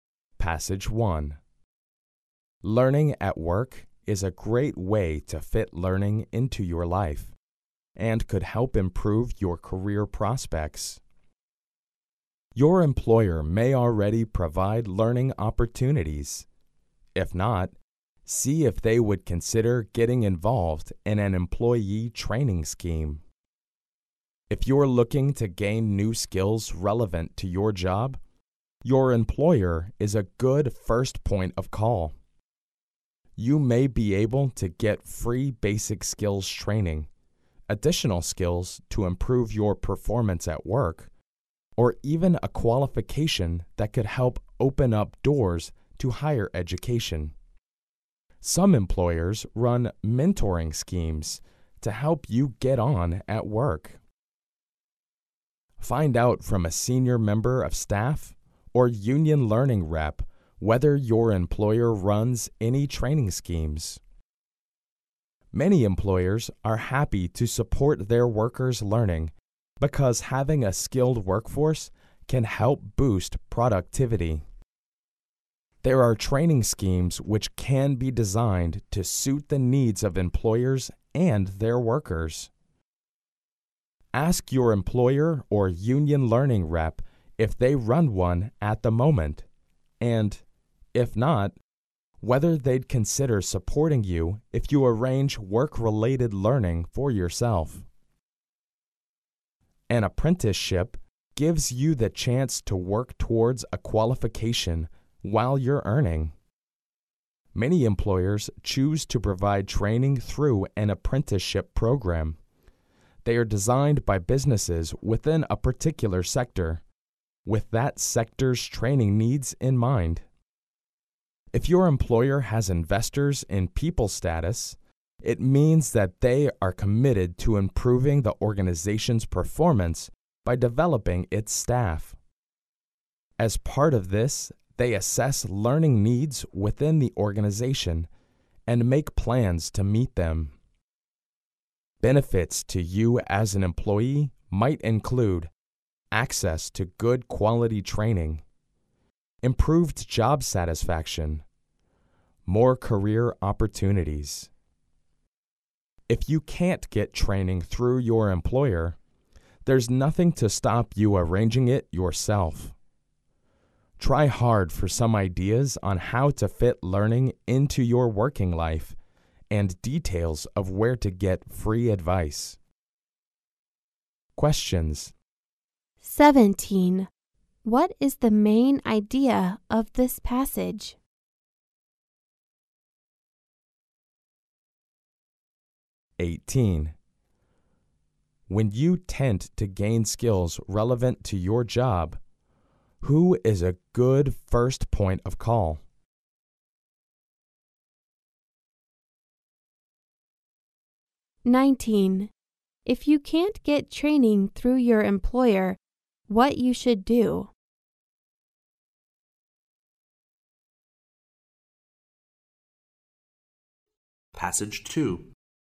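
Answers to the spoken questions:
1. Your employer
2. Arrange it yourself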